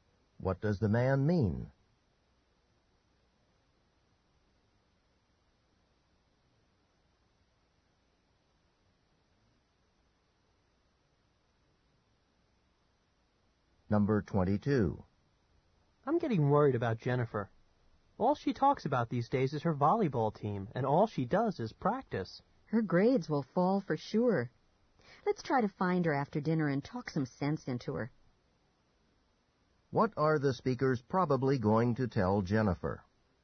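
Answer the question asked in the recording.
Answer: To spend less time on volleyball and more on studies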